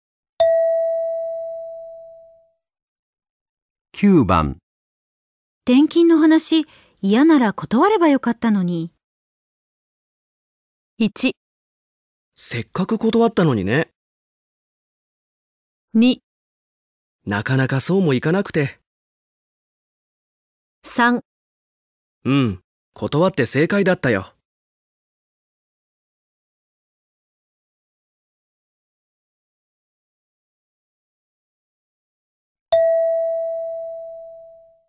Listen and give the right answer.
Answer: 2

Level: N2 Listening · Test 3